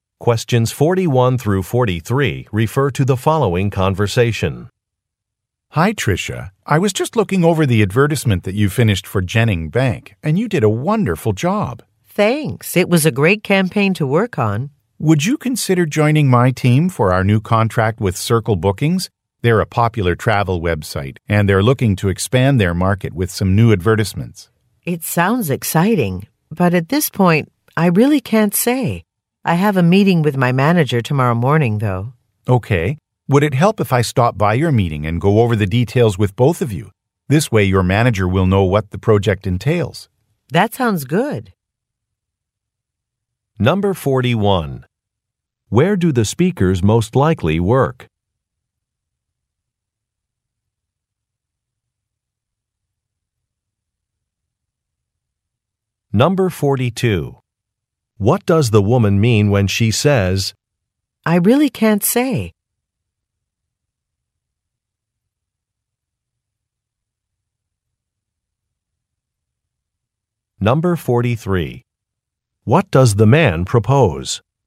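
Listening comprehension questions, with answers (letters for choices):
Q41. Where do the speakers most likely work?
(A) At an advertising firm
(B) At a bank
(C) At a law office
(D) At a travel agency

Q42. What does the woman mean when she says, "I really can't say"?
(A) She is not allowed to repeat certain information.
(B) She cannot make a commitment yet.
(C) She should leave for an appointment.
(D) She has to correct some errors in a report.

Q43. What does the man propose?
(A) Making travel arrangements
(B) Preparing a contract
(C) Joining a meeting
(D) Reviewing a report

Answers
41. A
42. B
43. C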